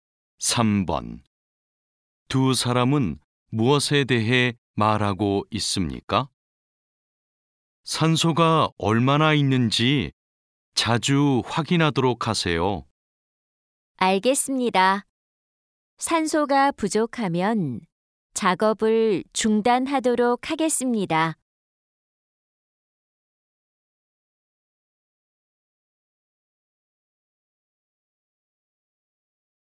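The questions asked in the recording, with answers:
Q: 두 사람은 무엇에 대해 말하고 있습니까?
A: 산소 농도 확인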